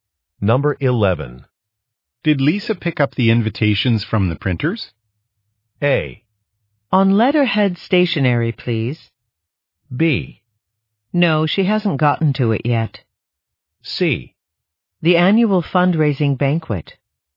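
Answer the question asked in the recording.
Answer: B: No, she hasn't gotten to it yet.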